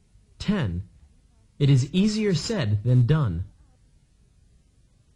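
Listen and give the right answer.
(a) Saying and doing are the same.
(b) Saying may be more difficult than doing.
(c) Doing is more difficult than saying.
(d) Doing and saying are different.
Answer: (c) Doing is more difficult than saying.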